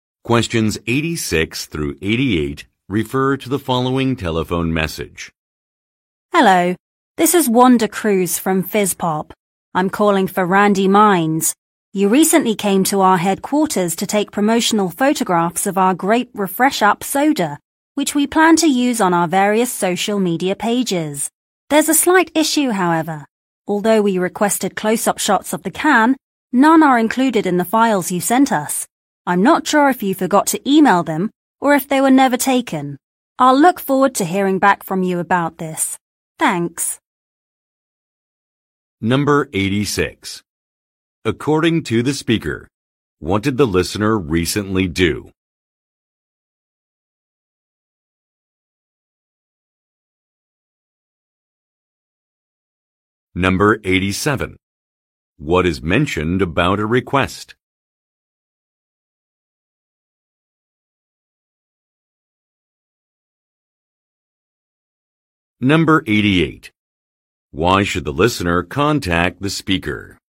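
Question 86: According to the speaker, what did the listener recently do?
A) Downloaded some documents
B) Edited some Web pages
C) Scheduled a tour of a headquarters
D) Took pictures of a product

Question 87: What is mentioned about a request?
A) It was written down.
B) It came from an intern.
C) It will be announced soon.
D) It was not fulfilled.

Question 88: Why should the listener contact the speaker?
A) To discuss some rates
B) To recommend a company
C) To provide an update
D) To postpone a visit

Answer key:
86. Took pictures of a product
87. It was not fulfilled.
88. To provide an update

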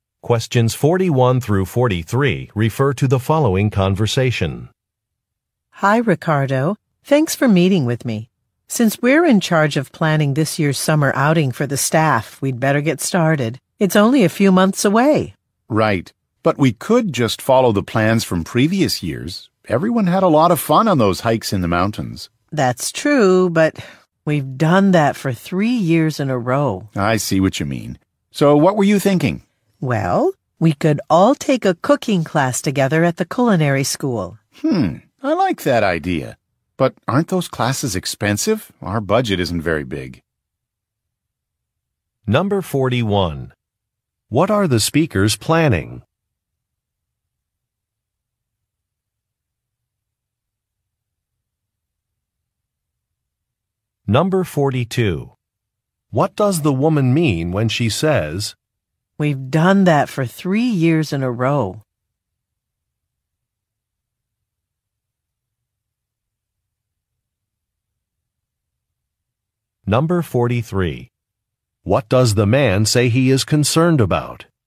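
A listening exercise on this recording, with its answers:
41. What are the speakers planning?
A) A client visit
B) A health fair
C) A fund-raising dinner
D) A company outing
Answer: A company outing

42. What does the woman mean when she says, "we've done that for three years in a row"?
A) She does not have much experience with a task.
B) She thinks an activity has been popular.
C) She does not want to repeat an activity.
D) She does not need directions to a location.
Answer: She does not want to repeat an activity.

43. What does the man say he is concerned about?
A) The price of a class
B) The distance to a venue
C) Road closures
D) Scheduling conflicts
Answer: The price of a class

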